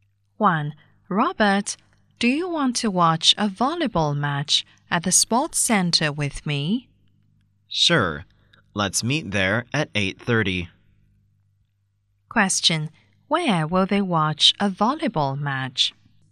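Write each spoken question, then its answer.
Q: Where will they watch a volleyball match?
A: At the sports center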